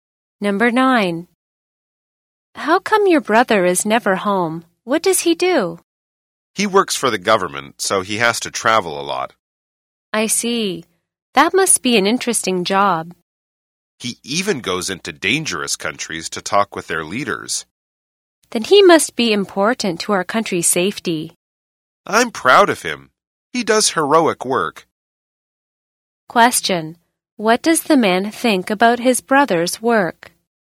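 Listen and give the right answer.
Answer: It is heroic and important to the country's safety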